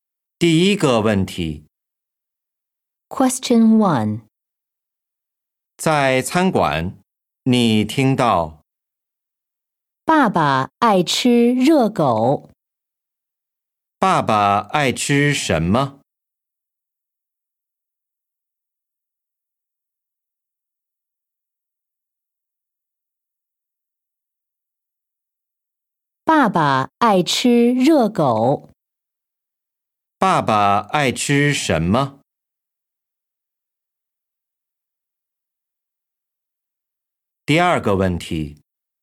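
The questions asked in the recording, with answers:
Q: 爸爸爱吃什么?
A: 热狗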